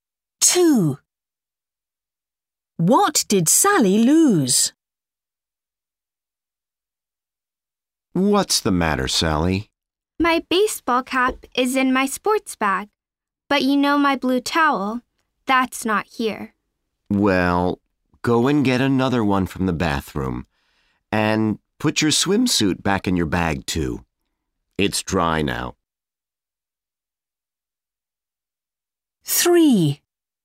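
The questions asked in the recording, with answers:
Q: What did Sally lose?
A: Her blue towel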